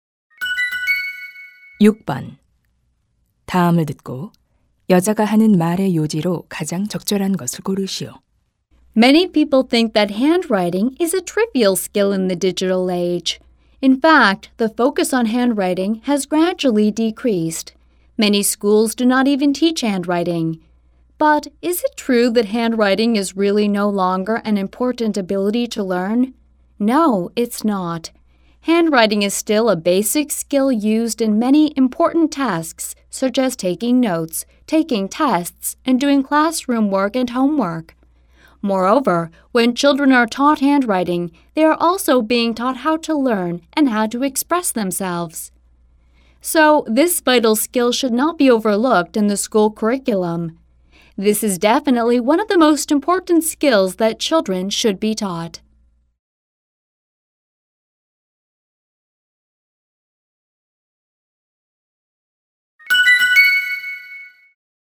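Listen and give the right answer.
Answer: 학교 교육과정에서 손글씨 교육을 소홀히 해서는 안 된다.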